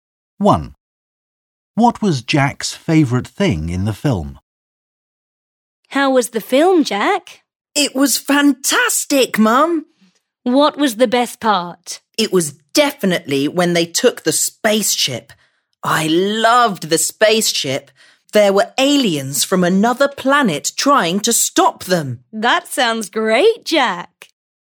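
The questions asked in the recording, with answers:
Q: What was Jack's favourite thing in the film?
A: the spaceship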